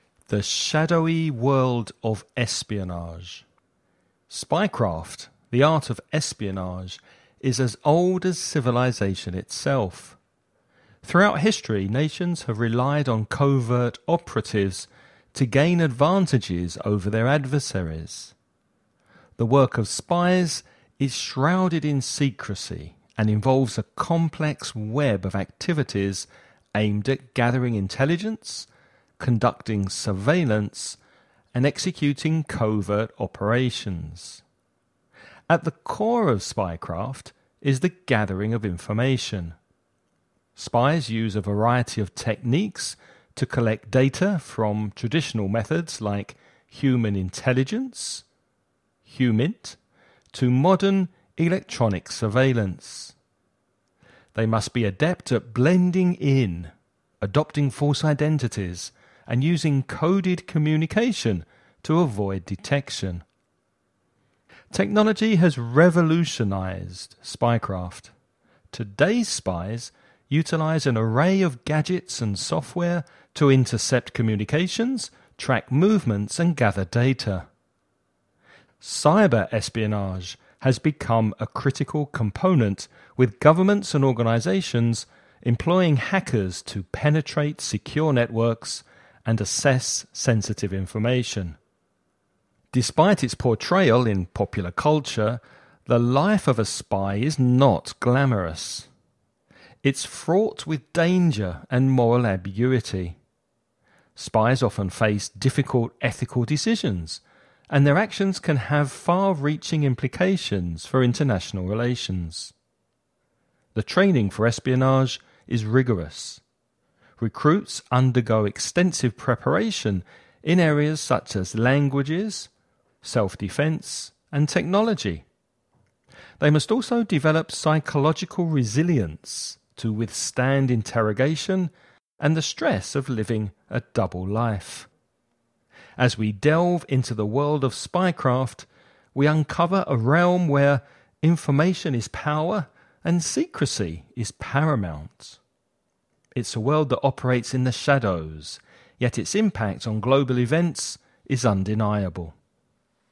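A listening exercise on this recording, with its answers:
You're going to listen to a man talking about espionage and spying. Before you listen, read the following questions.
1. What is the primary goal of spy craft?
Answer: Gathering information (intelligence).

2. How has technology affected espionage?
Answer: It has revolutionized it: spies use gadgets and software to intercept communications, track movements and gather data, and cyber espionage has become a critical component.

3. What challenges do spies face in their line of work?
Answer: Danger, moral ambiguity and difficult ethical decisions with far-reaching implications.

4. What kind of training do spies receive?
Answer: Rigorous training in languages, self-defense and technology, plus developing psychological resilience.

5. What is the significance of information in the world of espionage?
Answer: Information is power.

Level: Listening Practice INTERMEDIO 2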